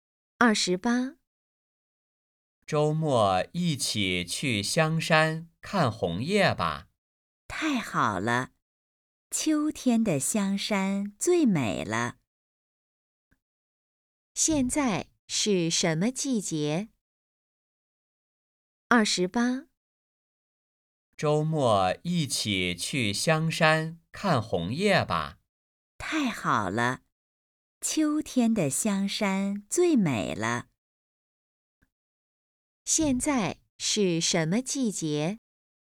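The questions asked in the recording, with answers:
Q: 现在是什么季节?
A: 秋天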